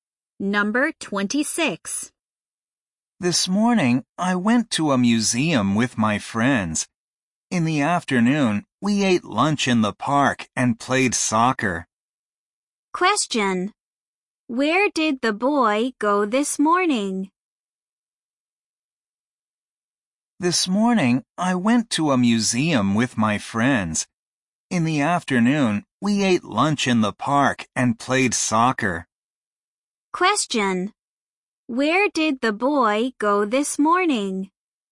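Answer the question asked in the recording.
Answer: To a museum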